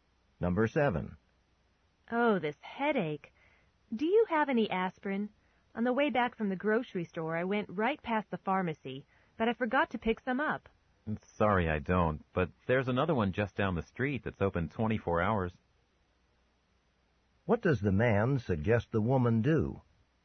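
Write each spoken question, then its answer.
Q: What does the man suggest the woman do?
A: Go to the 24-hour pharmacy down the street.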